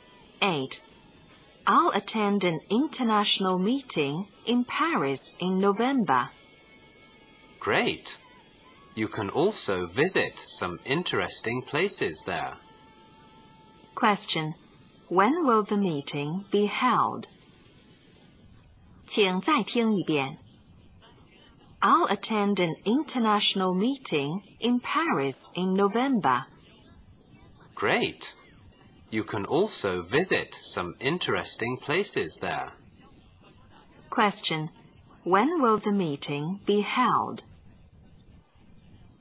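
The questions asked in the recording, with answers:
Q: When will the meeting be held?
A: In November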